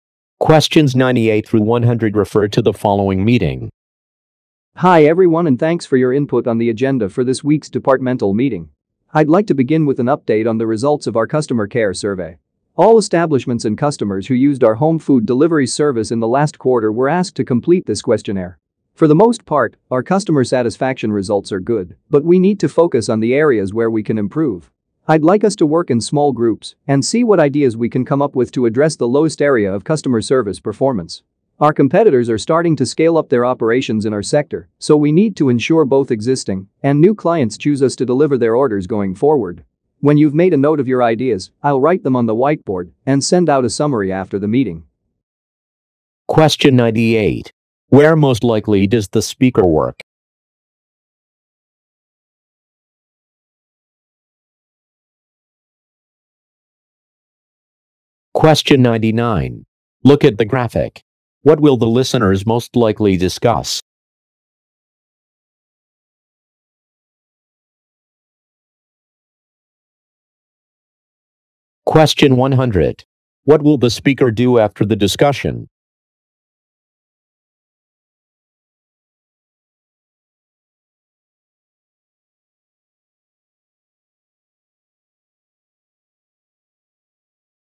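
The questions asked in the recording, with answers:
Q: Where most likely does the speaker work?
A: At a home food delivery company

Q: What will the speaker do after the discussion?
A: Send out a summary of the ideas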